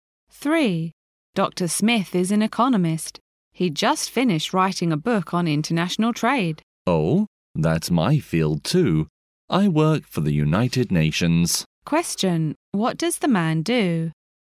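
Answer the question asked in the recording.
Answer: He works for the United Nations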